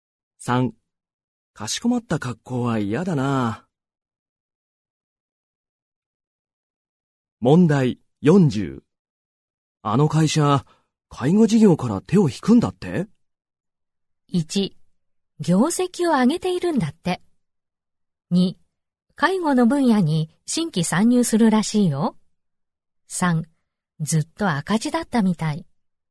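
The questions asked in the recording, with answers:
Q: あの会社、介護事業から手を引くんだって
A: 3: ずっと赤字だったみたい。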